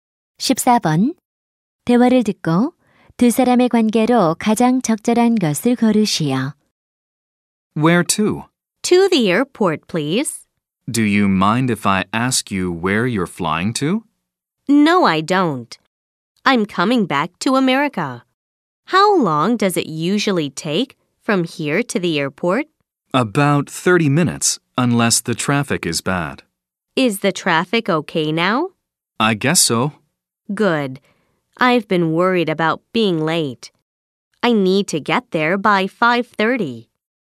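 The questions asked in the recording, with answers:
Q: 대화를 듣고 두 사람의 관계로 가장 적절한 것을 고르시오.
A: 택시 기사와 승객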